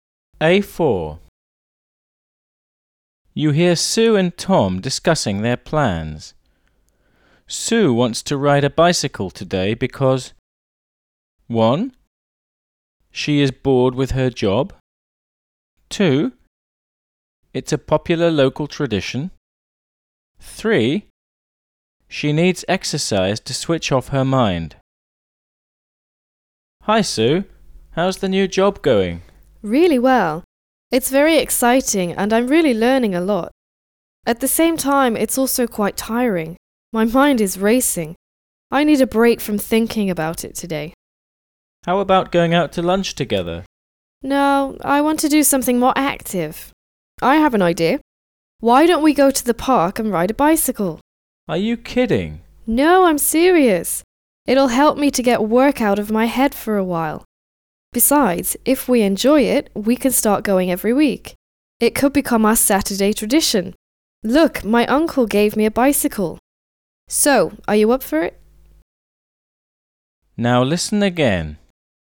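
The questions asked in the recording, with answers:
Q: Sue wants to ride a bicycle today because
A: 3: She needs exercise to switch off her mind.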